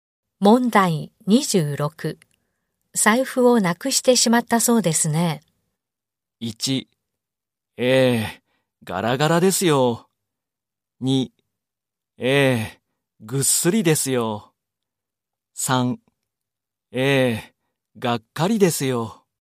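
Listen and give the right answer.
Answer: 3: ええ、がっかりですよ。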